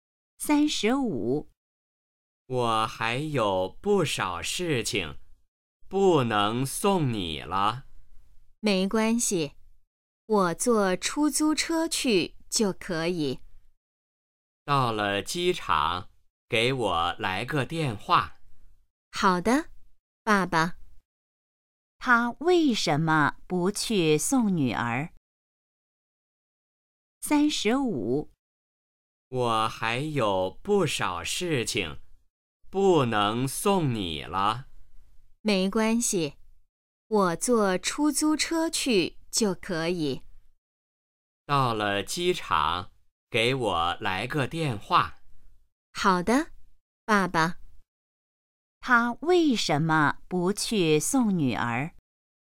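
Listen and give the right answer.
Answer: 他还有不少事情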